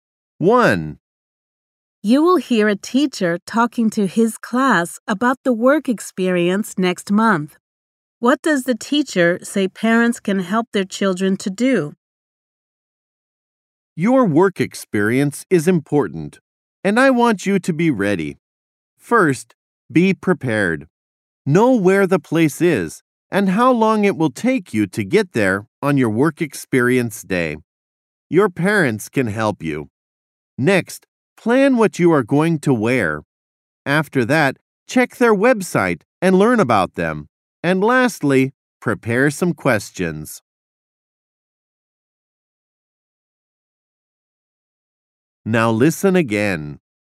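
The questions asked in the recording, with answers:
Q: What does the teacher say parents can help their children to do?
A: Find out where the workplace is and how long it takes to get there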